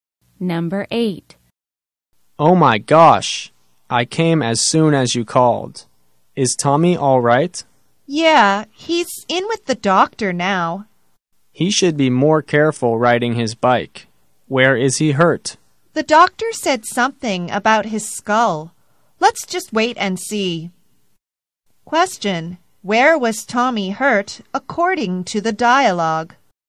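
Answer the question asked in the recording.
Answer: His skull (head).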